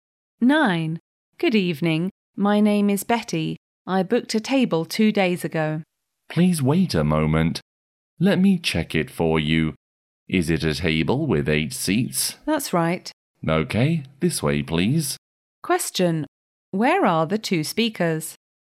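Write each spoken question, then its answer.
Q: Where are the 2 speakers?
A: In a restaurant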